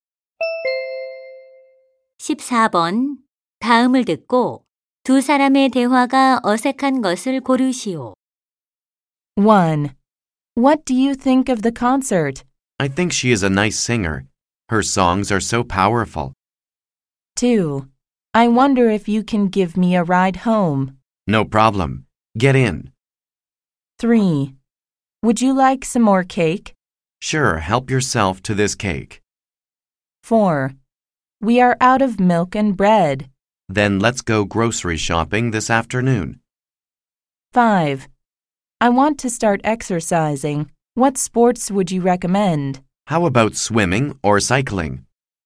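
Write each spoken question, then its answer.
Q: 다음을 듣고 두 사람의 대화가 어색한 것을 고르시오.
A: 3: Would you like some more cake? / Sure, help yourself to this cake.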